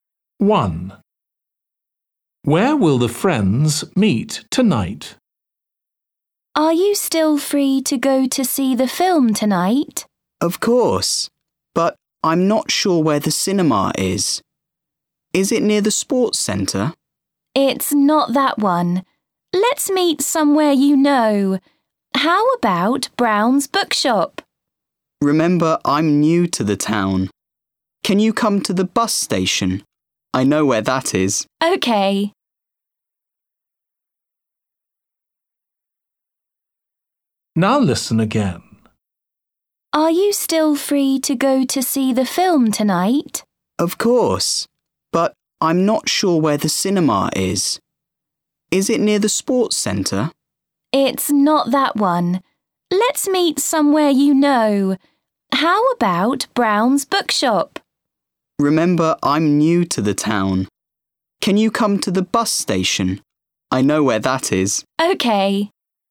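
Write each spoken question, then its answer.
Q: Where will the friends meet tonight?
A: at the bus station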